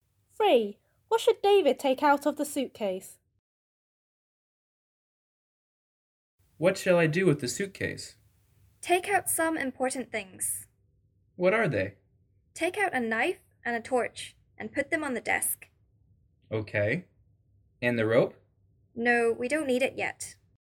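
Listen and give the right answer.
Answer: A knife and a torch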